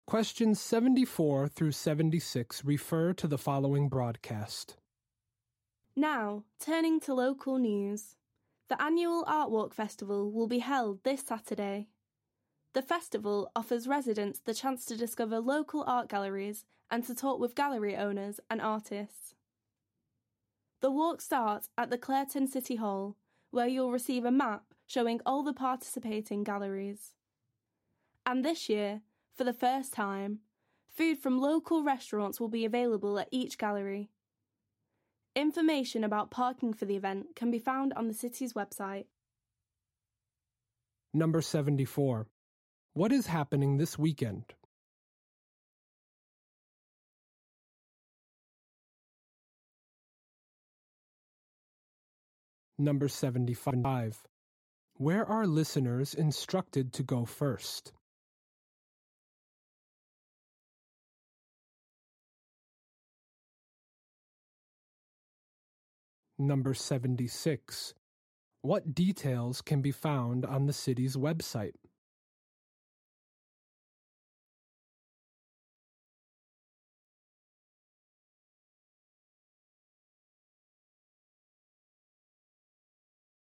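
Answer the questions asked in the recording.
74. The annual Art Walk Festival
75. Clareton City Hall
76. Parking information for the event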